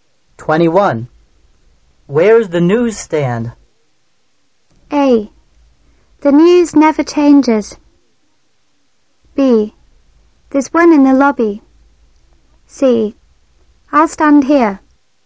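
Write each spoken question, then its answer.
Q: Where is the newsstand?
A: B: There's one in the lobby.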